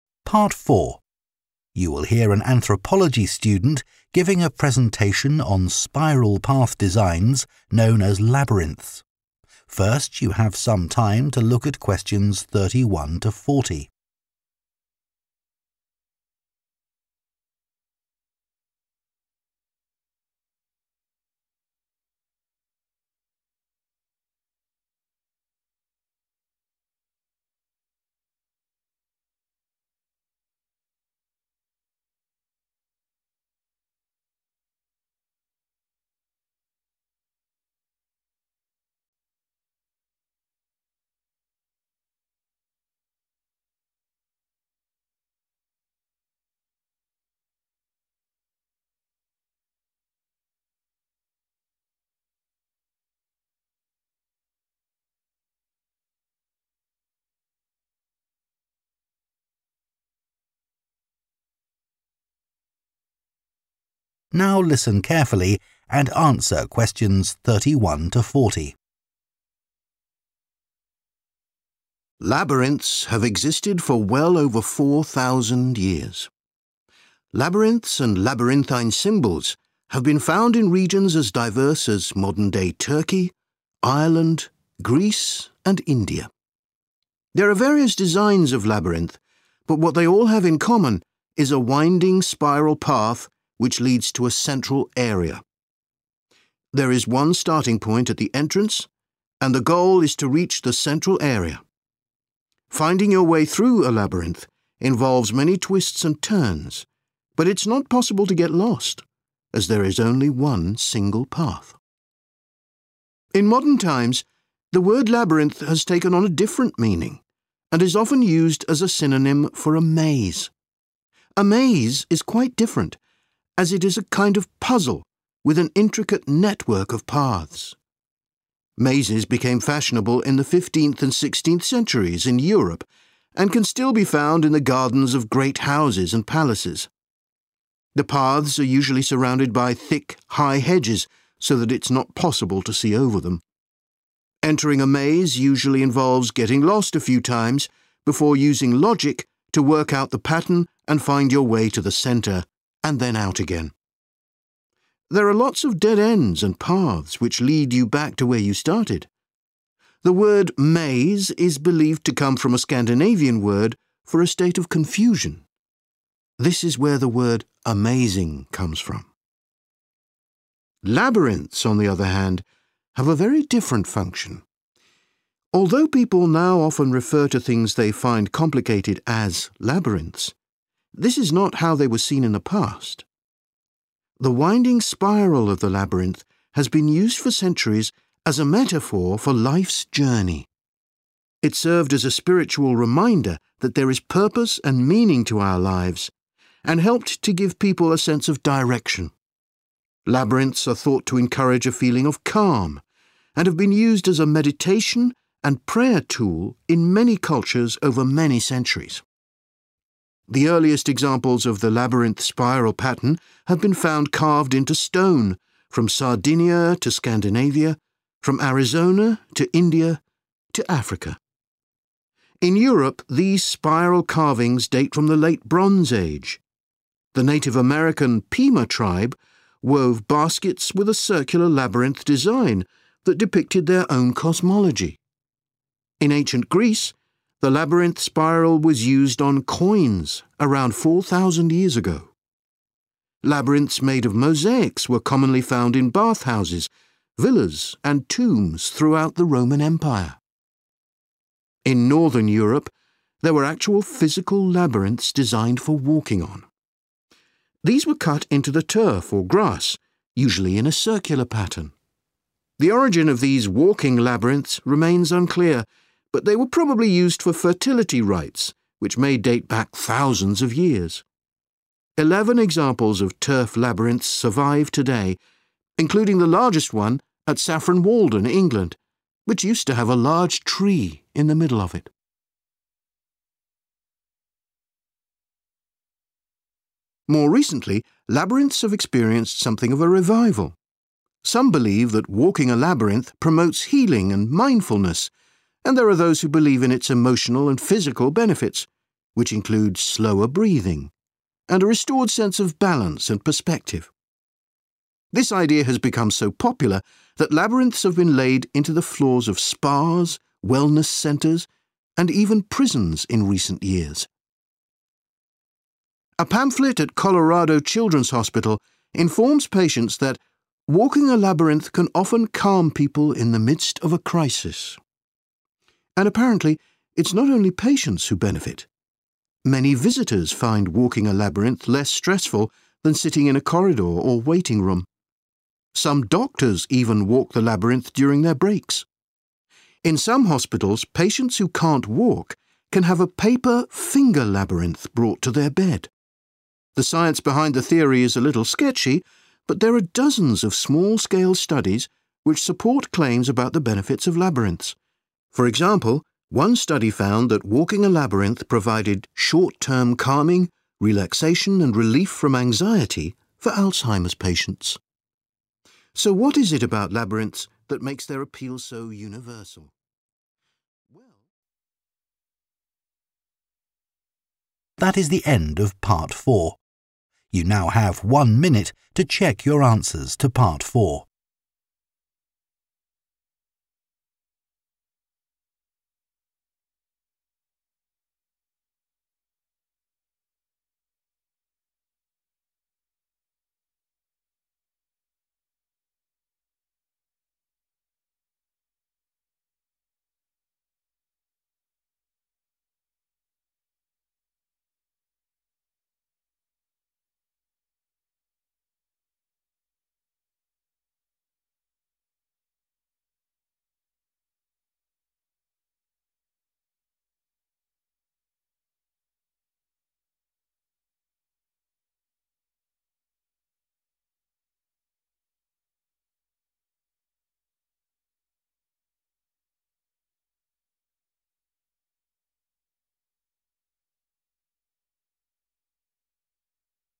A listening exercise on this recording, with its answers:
Complete the notes below. Write ONE WORD ONLY for each answer.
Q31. Mazes are a type of 31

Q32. is needed to navigate through a maze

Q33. the word 'maze' is derived from a word meaning a feeling of 33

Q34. They have frequently been used in 34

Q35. Ancient carvings on 35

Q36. Ancient Greeks used the symbol on 36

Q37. The largest surviving example of a turf labyrinth once had a big 37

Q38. walking a maze can reduce a person's 38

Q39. patients who can't walk can use 'finger labyrinths' made from 39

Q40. research has shown that Alzheimer's sufferers experience less 40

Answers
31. puzzle
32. logic
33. confusion
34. meditation
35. stone
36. coins
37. tree
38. breathing
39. paper
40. anxiety

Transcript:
Labyrinths have existed for well over 4,000 years. Labyrinths and labyrinthine symbols have been found in regions as diverse as modern-day Turkey, Ireland, Greece, and India. There are various designs of labyrinth but what they all have in common is a winding spiral path which leads to a central area. There is one starting point at the entrance and the goal is to reach the central area. Finding your way through a labyrinth involves many twists and turns, but it's not possible to get lost as there is only one single path.
In modern times, the word labyrinth has taken on a different meaning and is often used as a synonym for a maze. Mazes became fashionable in the 15th and 16th centuries in Europe, and can still be found in the gardens of great houses and palaces. The paths are usually surrounded by thick, high hedges so that it's not possible to see over them. There are lots of dead ends and paths which lead you back to where you started. This is where the word 'amazing' comes from.
Labyrinths, on the other hand, have a very different function. Although people now often refer to things they find complicated as labyrinths, this is not how they were seen in the past. The winding spiral of the labyrinth has been used for centuries as a metaphor for life's journey. It served as a spiritual reminder that there is purpose and meaning to our lives and helped to give people a sense of direction.
In Europe, these spiral carvings date from the late Bronze Age. The Native American Pima tribe wove baskets with a circular labyrinth design that depicted their own cosmology. Labyrinths made of mosaics were commonly found in bathhouses, villas and tombs throughout the Roman Empire.
In Northern Europe, there were actual physical labyrinths designed for walking on. These were cut into the turf or grass, usually in a circular pattern. The origin of these walking labyrinths remains unclear, but they were probably used for fertility rites which may date back thousands of years.
More recently labyrinths have experienced something of a revival. Some believe that walking a labyrinth promotes healing and mindfulness, and there are those who believe in its emotional and physical benefits, which include slower breathing [có những người tin vào lợi ích tinh thần và thể chất của nó, bao gồm việc thở chậm hơn] (Question 38) and a restored sense of balance and perspective. This idea has become so popular that labyrinths have been laid into the floors of spas, wellness centres and even prisons in recent years.
A pamphlet at Colorado Children's Hospital informs patients that 'walking a labyrinth can often calm people in the midst of a crisis'. And apparently, it's not only patients who benefit. Many visitors find walking a labyrinth less stressful than sitting in a corridor or waiting room. Some doctors even walk the labyrinth during their breaks. The science behind the theory is a little sketchy, but there are dozens of small-scale studies which support claims about the benefits of labyrinths.